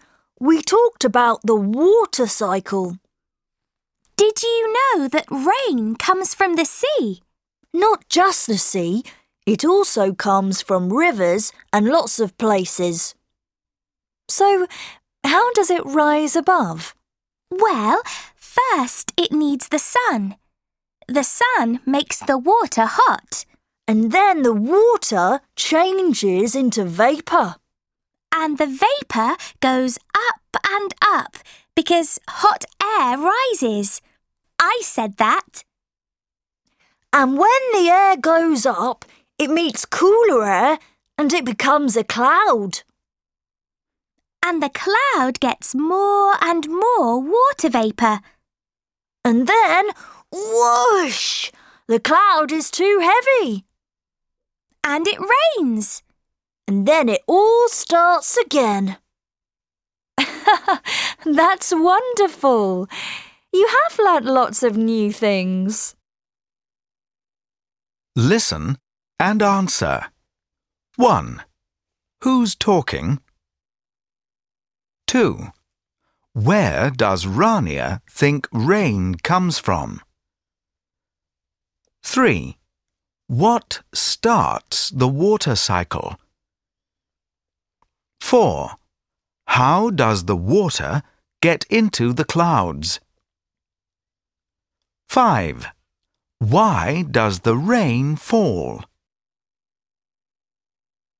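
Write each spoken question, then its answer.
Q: Where does Rania think rain comes from?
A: The sea

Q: What starts the water cycle?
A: The sun

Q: How does the water get into the clouds?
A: The sun heats it, it changes into vapour and rises

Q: Why does the rain fall?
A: The cloud becomes too heavy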